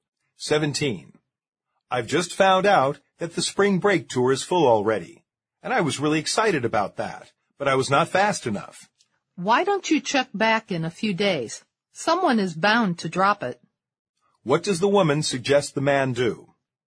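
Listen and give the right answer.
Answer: Check back in a few days, since someone may drop out of the tour.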